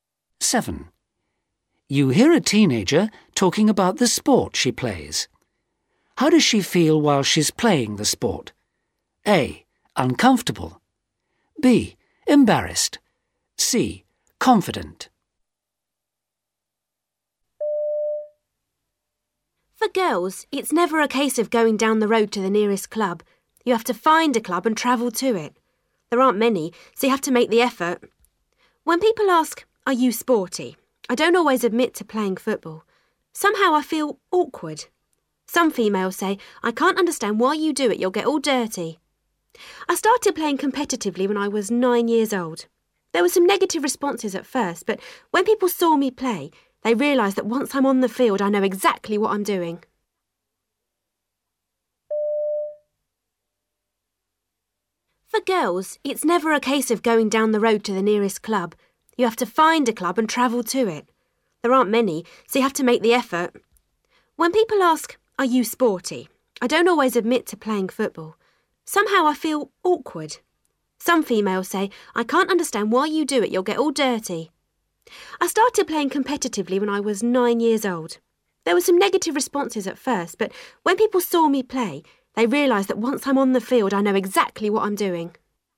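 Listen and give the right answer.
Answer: C: Confident.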